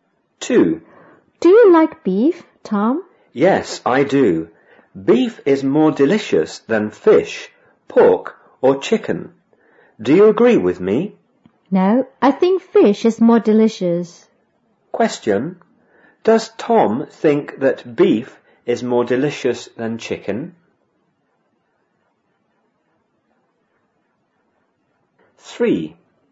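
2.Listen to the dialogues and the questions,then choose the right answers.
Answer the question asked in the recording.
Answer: Yes, he does.

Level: 五年级下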